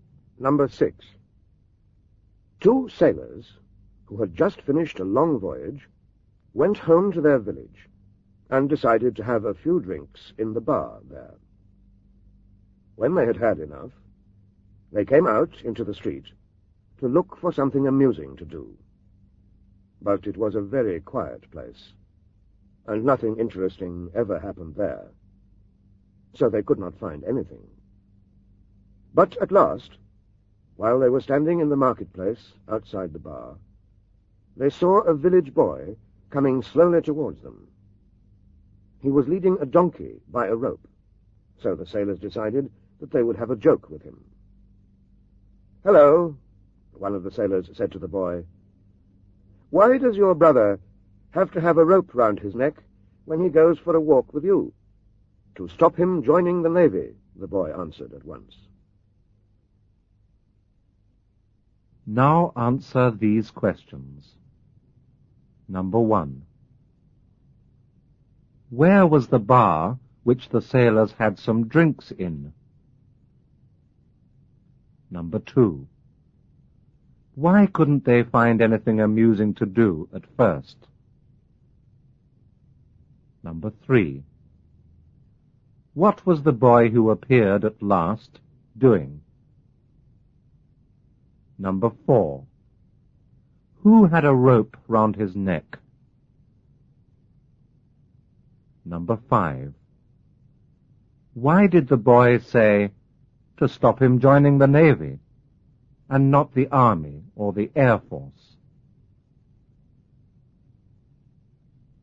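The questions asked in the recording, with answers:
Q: Where was the bar which the sailors had some drinks in?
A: In the sailors' home village

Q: Why couldn't they find anything amusing to do at first?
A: The village was very quiet and nothing interesting ever happened there

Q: What was the boy who appeared at last doing?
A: Leading a donkey by a rope towards them

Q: Who had a rope round his neck?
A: The donkey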